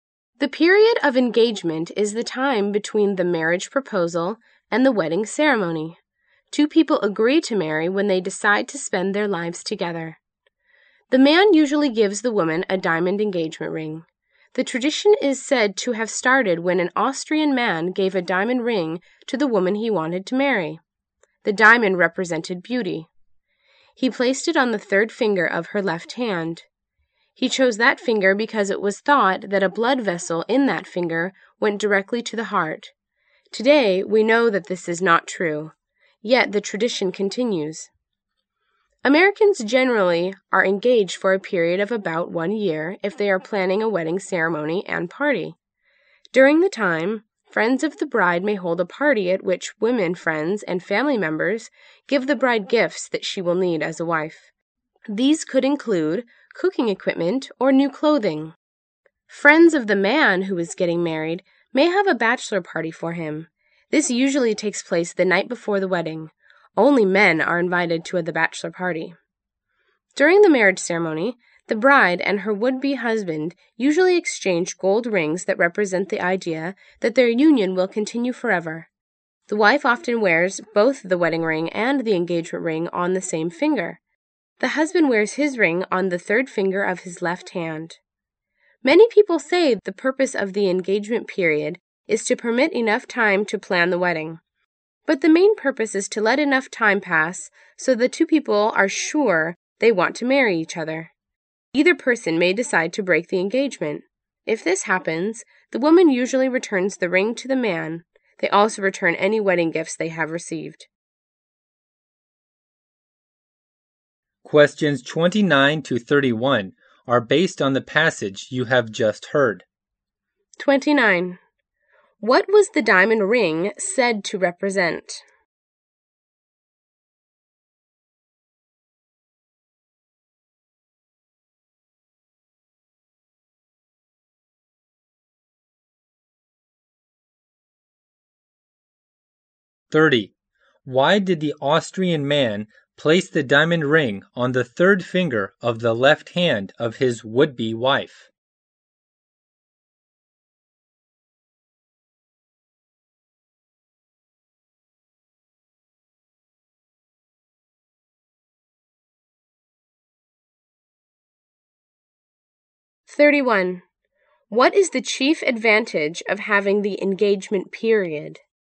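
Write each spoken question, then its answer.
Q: What was the diamond ring said to represent?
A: Beauty.

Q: Why did the Austrian man place the diamond ring on the third finger of the left hand of his would-be wife?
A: He thought a blood vessel in that finger went directly to the heart.

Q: What is the chief advantage of having the engagement period?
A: It gives the couple time to be sure they want to marry each other.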